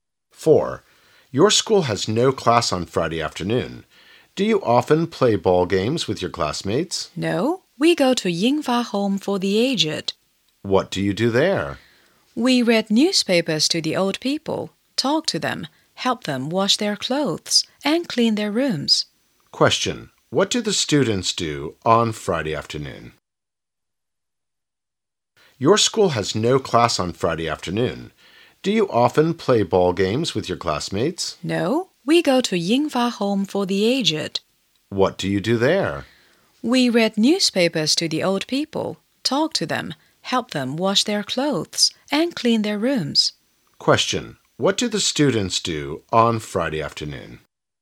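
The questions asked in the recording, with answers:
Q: What do the students do on Friday afternoon?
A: They go to Yingfa Home for the Aged to help the old people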